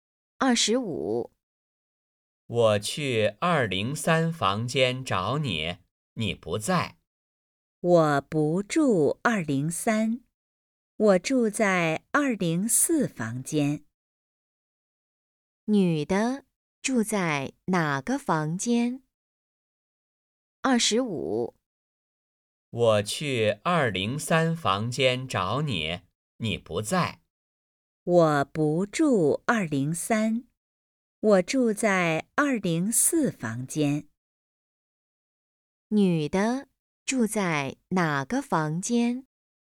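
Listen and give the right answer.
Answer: 204房间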